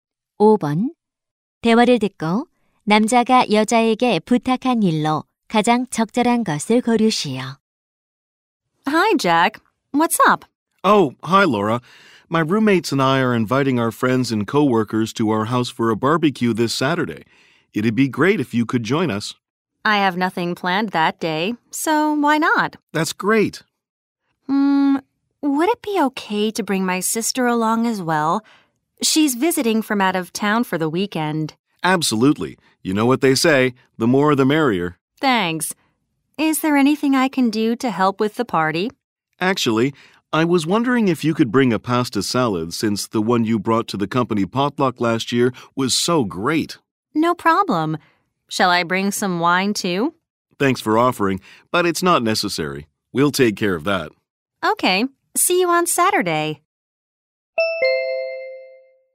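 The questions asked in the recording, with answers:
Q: 대화를 듣고 남자가 여자에게 부탁한 일로 가장 적절한 것을 고르시오.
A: 파스타 샐러드 가져오기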